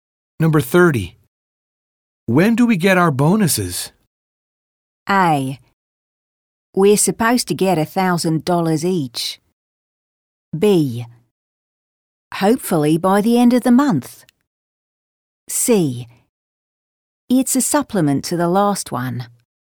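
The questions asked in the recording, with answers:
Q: When do we get our bonuses?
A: B: Hopefully by the end of the month.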